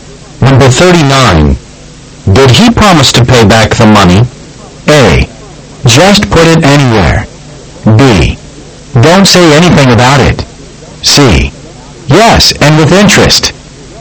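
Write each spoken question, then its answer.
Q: Did he promise to pay back the money?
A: C: Yes, and with interest.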